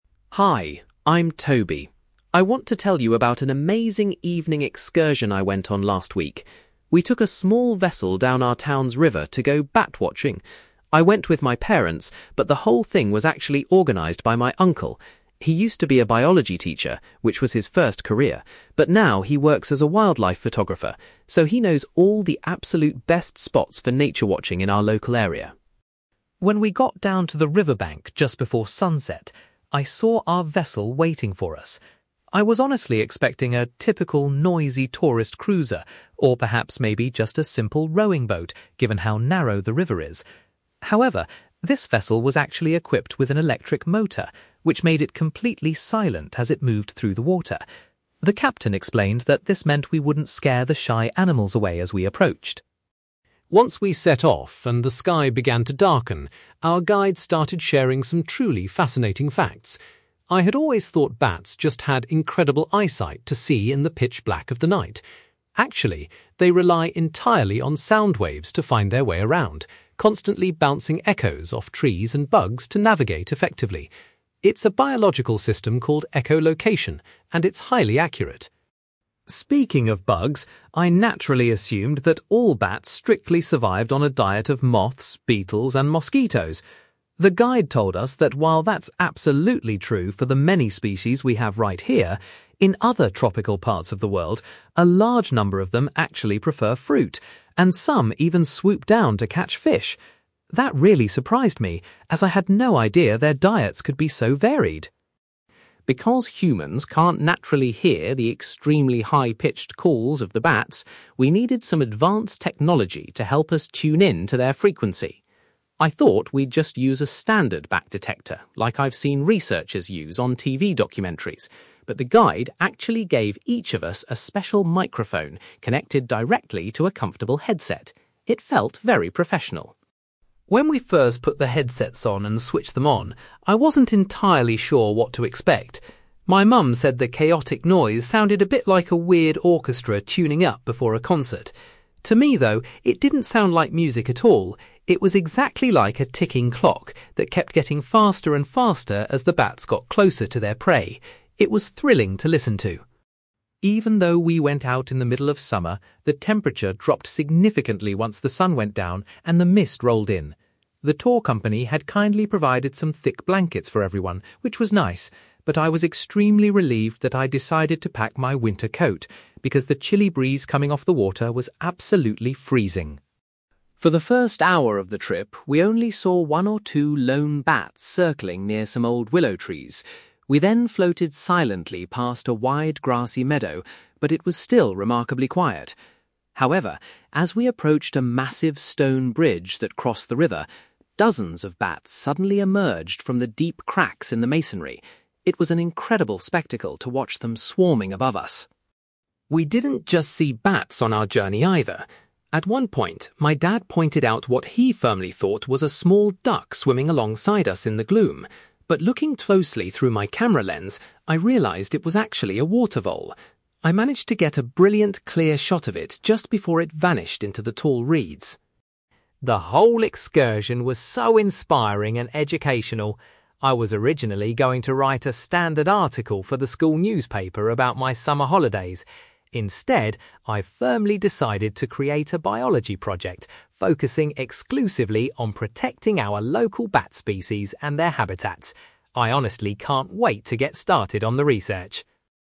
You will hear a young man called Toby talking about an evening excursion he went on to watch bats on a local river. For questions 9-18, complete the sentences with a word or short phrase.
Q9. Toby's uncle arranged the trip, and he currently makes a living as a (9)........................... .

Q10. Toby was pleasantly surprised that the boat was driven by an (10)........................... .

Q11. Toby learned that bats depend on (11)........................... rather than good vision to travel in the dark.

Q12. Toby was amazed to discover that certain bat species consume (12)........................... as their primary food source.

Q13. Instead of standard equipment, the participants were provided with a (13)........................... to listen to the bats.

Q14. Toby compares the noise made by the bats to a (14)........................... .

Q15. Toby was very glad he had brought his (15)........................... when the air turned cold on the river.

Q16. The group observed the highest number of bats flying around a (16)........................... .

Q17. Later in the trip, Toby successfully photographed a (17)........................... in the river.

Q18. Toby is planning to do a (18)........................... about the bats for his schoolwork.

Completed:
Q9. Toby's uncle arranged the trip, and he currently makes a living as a wildlife photographer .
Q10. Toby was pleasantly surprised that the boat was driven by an electric motor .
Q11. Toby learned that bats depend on sound waves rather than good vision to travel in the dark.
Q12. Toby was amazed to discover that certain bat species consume fruit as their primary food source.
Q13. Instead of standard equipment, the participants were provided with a special microphone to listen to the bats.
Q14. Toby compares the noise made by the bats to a ticking clock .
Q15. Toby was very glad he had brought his winter coat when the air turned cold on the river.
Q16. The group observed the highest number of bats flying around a stone bridge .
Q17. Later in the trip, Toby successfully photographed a water vole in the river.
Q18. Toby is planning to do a biology project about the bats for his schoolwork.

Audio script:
Toby: Hi, I'm Toby. I want to tell you about an amazing evening excursion I went on last week. We took a small vessel down our town's river to go bat-watching! I went with my parents, but the whole thing was actually organized by my uncle. He used to be a biology teacher, which was his first career, but now he works as a wildlife photographer, so he knows all the absolute best spots for nature watching in our local area.
When we got down to the riverbank just before sunset, I saw our vessel waiting for us. I was honestly expecting a typical noisy tourist cruiser, or perhaps maybe just a simple rowing boat given how narrow the river is. However, this vessel was actually equipped with an electric motor, which made it completely silent as it moved through the water. The captain explained that this meant we wouldn't scare the shy animals away as we approached.
Once we set off and the sky began to darken, our guide started sharing some truly fascinating facts. I had always thought bats just had incredible eyesight to see in the pitch black of the night. Actually, they rely entirely on sound waves to find their way around, constantly bouncing echoes off trees and bugs to navigate effectively. It's a biological system called echolocation, and it's highly accurate.
Speaking of bugs, I naturally assumed that all bats strictly survived on a diet of moths, beetles and mosquitoes. The guide told us that while that's absolutely true for the many species we have right here, in other tropical parts of the world, a large number of them actually prefer fruit, and some even swoop down to catch fish! That really surprised me, as I had no idea their diets could be so varied.
Because humans can't naturally hear the extremely high-pitched calls of the bats, we needed some advanced technology to help us tune in to their frequency. I thought we'd just use a standard bat detector like I've seen researchers use on TV documentaries, but the guide actually gave each of us a special microphone connected directly to a comfortable headset. It felt very professional.
When we first put the headsets on and switched them on, I wasn't entirely sure what to expect. My mum said the chaotic noise sounded a bit like a weird orchestra tuning up before a concert. To me, though, it didn't sound like music at all; it was exactly like a ticking clock that kept getting faster and faster as the bats got closer to their prey. It was thrilling to listen to.
Even though we went out in the middle of summer, the temperature dropped significantly once the sun went down and the mist rolled in. The tour company had kindly provided some thick blankets for everyone, which was nice, but I was extremely relieved that I'd decided to pack my winter coat, because the chilly breeze coming off the water was absolutely freezing.
For the first hour of the trip, we only saw one or two lone bats circling near some old willow trees. We then floated silently past a wide grassy meadow, but it was still remarkably quiet. However, as we approached a massive stone bridge that crossed the river, dozens of bats suddenly emerged from the deep cracks in the masonry. It was an incredible spectacle to watch them swarming above us!
We didn't just see bats on our journey, either. At one point, my dad pointed out what he firmly thought was a small duck swimming alongside us in the gloom. But looking closely through my camera lens, I realised it was actually a water vole. I managed to get a brilliant, clear shot of it just before it vanished into the tall reeds.
The whole excursion was so inspiring and educational. I was originally going to write a standard article for the school newspaper about my summer holidays. Instead, I've firmly decided to create a biology project focusing exclusively on protecting our local bat species and their habitats. I honestly can't wait to get started on the research!

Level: B2